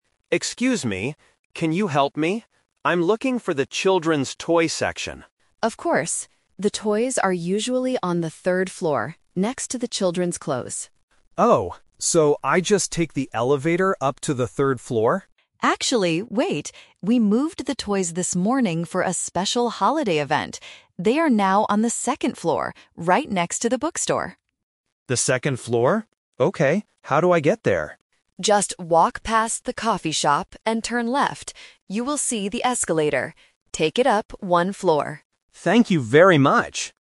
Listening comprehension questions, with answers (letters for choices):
Listen to the conversation and choose the correct answer (A, B, or C) for each question.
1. Where is the toy section NOW?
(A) On the second floor.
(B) On the third floor.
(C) On the fourth floor.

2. What is the toy section next to?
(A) The children's clothes.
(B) The coffee shop.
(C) The bookstore.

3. What should the customer do to go up?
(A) Take the elevator.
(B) Take the escalator.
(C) Walk up the stairs.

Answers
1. A
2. C
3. B

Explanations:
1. This is "The Twist". The staff says the toys are usually on the 3rd floor, but they moved them today. "They are now on the second floor." Why the trap is wrong: Option (B) is the trap. The 3rd floor is the old location. Option (C) is not mentioned.
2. The staff clearly says the toys are "right next to the bookstore" on the second floor. Why the trap is wrong: Option (A) is the trap because it was the old location on the 3rd floor. Option (B) is also a trap; the coffee shop is where the customer needs to walk past, not the shop next to the toys.
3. At the end, the staff gives directions: "You will see the escalator. Take it up one floor." Why the trap is wrong: Option (A) is the trap. The customer asks about the elevator first, but the staff gives different directions later. Option (C) is a plausible way to go up, but it is not mentioned.

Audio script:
Customer: Excuse me. Can you help me? I'm looking for the children's toy section.
Staff: Of course. The toys are usually on the third floor, next to the children's clothes.
Customer: Oh, so I just take the elevator up to the third floor?
Staff: Actually, wait. We moved the toys this morning for a special holiday event. They are now on the second floor, right next to the bookstore.
Customer: The second floor? Okay. How do I get there?
Staff: Just walk past the coffee shop and turn left. You will see the escalator. Take it up one floor.
Customer: Thank you very much!